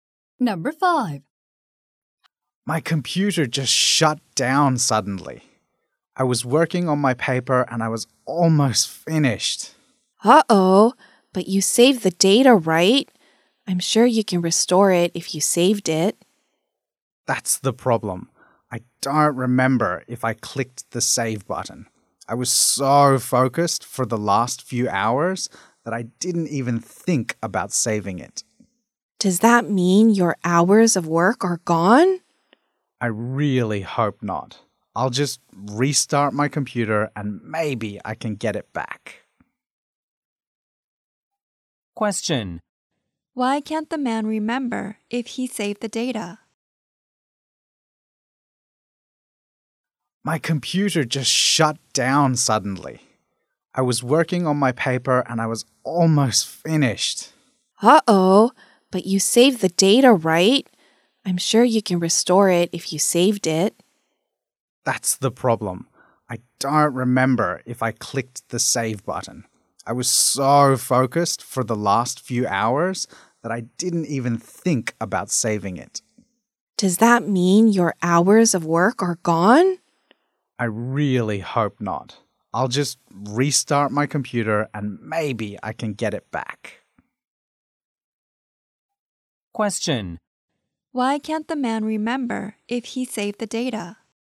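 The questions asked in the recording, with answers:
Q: Why can't the man remember if he saved the data?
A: He was so focused on his work that he didn't think about saving.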